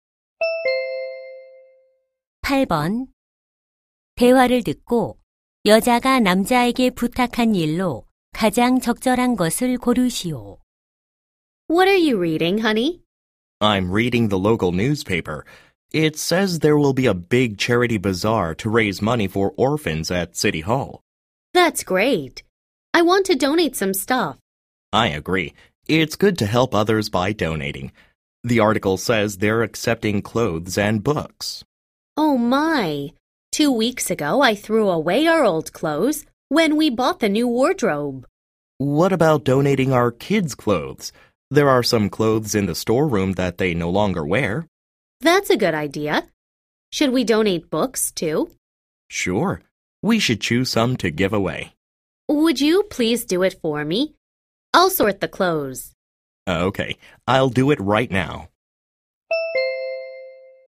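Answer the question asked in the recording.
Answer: 기부할 책 고르기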